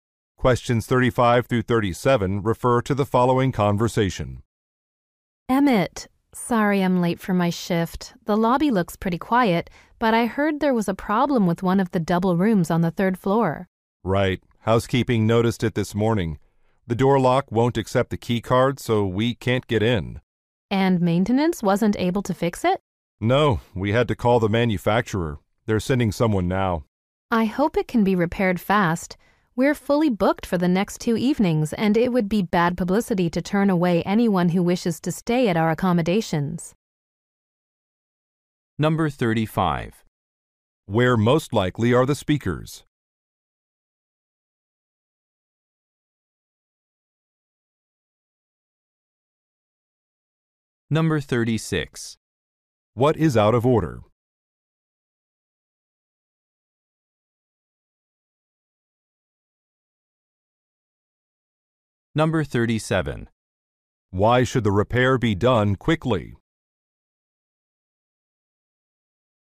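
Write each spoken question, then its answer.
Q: Where most likely are the speakers?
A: At a hotel

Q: What is out of order?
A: A door lock

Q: Why should the repair be done quickly?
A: The hotel is fully booked for the next two evenings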